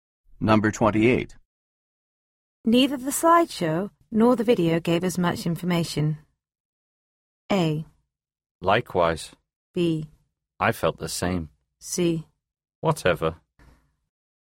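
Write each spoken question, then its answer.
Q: Neither the slideshow nor the video gave us much information.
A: B: I felt the same.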